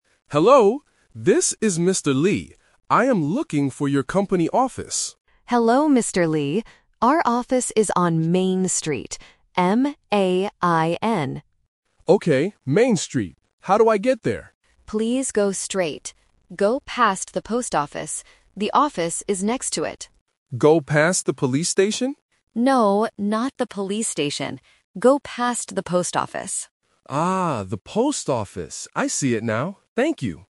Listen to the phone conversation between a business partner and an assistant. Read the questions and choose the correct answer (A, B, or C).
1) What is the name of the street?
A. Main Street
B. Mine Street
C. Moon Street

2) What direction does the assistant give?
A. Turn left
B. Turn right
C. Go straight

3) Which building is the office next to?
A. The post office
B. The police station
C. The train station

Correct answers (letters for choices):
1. A
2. C
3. A

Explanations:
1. The assistant clearly states the street name and spells it out: "Our office is on Main Street. M-A-I-N." Why the traps are wrong: Options B and C are phonetic traps. "Mine" and "Moon" sound similar to "Main" or start with the same letter, testing if the student can follow the exact spelling.
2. When Mr. Lee asks how to get there, the assistant explicitly says, "Please go straight." Why the traps are wrong: Options A and B are plausible basic directions, but they are never mentioned in the audio.
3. The assistant tells Mr. Lee to "Go past the post office. The office is next to it." Why the traps are wrong: Option B is a trap because Mr. Lee asks, "Go past the police station?" but the assistant corrects him and says, "No, not the police station." Option C is a plausible building but is not mentioned in the conversation.